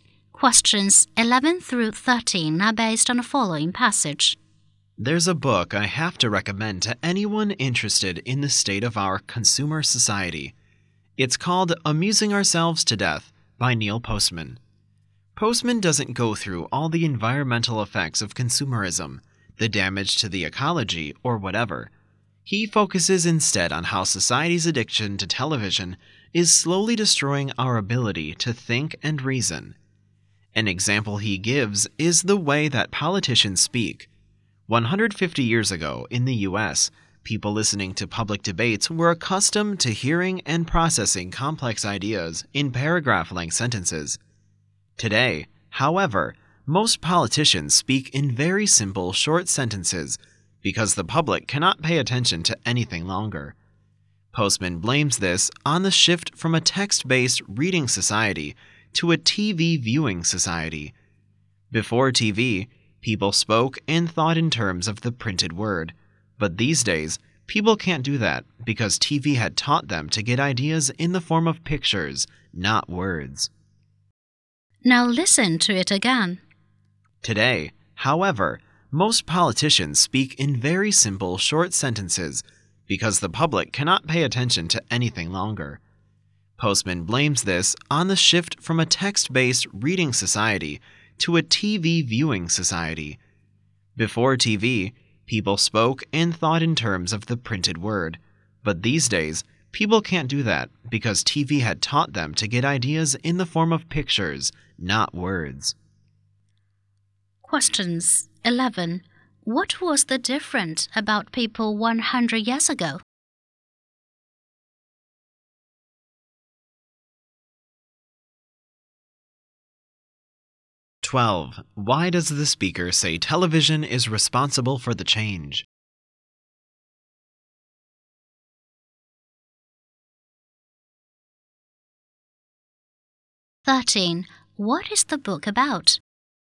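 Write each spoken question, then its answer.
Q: What was the difference about people 100 years ago?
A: They were used to hearing and processing complex ideas in long sentences

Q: Why does the speaker say television is responsible for the change?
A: TV taught people to get ideas in pictures, not words

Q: What is the book about?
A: How addiction to television is destroying our ability to think and reason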